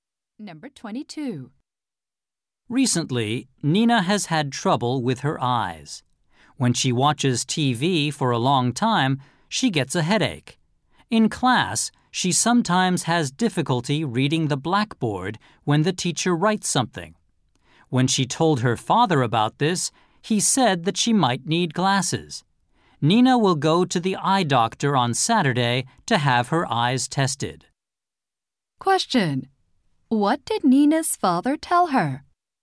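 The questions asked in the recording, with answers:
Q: Question: What did Nina's father tell her?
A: She might need glasses.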